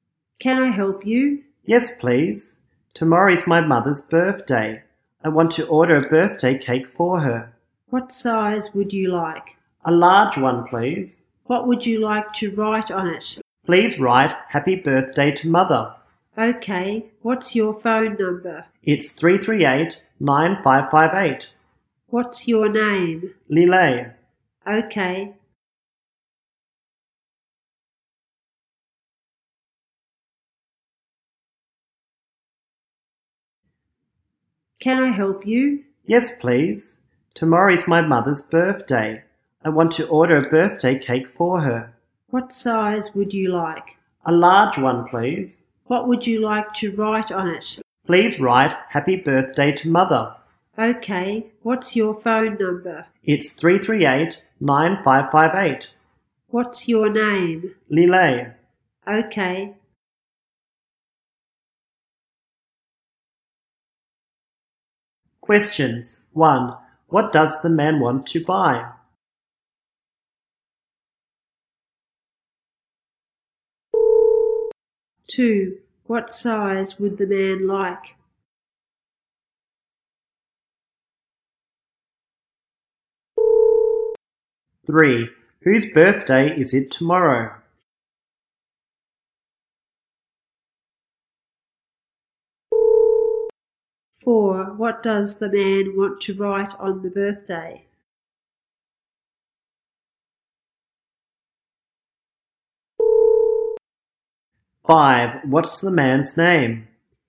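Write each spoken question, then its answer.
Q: What does the man want to buy?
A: A birthday cake

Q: What size would the man like?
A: A large one

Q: Whose birthday is it tomorrow?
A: His mother's

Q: What does the man want to write on the birthday?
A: Happy Birthday to Mother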